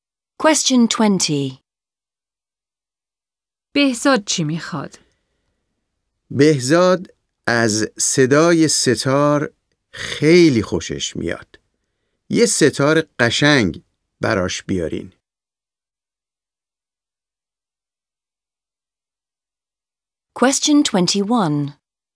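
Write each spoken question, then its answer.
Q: بهزاد چی میخواد؟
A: یک سه‌تار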